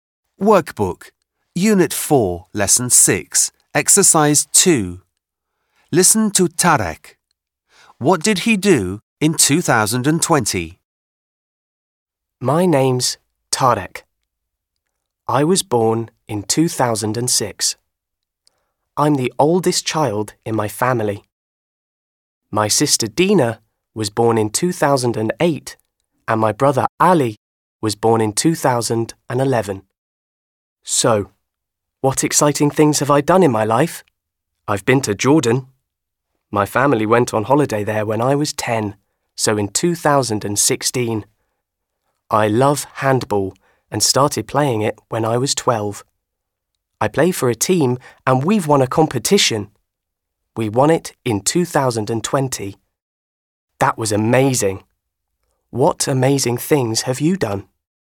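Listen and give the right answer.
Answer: His handball team won a competition.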